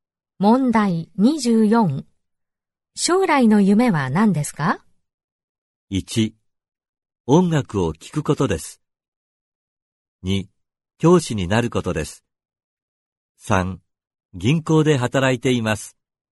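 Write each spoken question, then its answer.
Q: 将来の夢は何ですか?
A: 2: 教師になることです。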